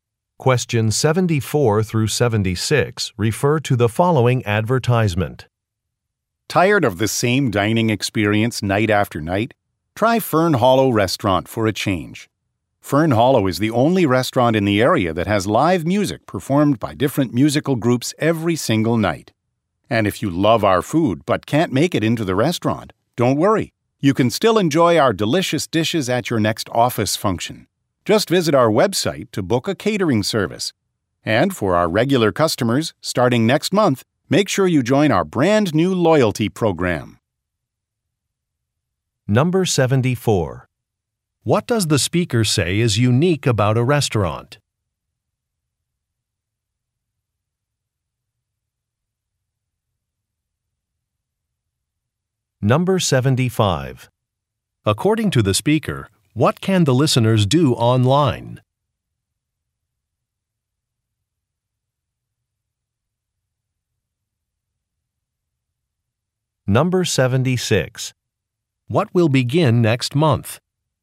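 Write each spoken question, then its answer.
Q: What does the speaker say is unique about a restaurant?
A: Live music by different groups every night

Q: According to the speaker, what can the listeners do online?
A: Book a catering service

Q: What will begin next month?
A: A loyalty program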